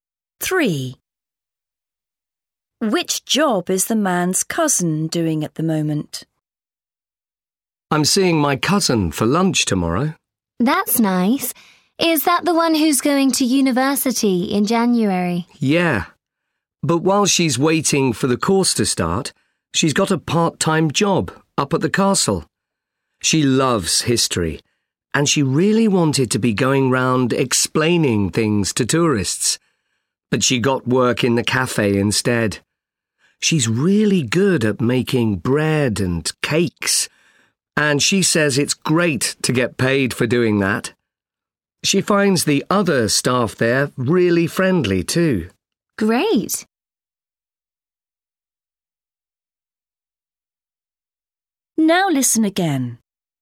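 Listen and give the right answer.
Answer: Working in the castle cafe, making bread and cakes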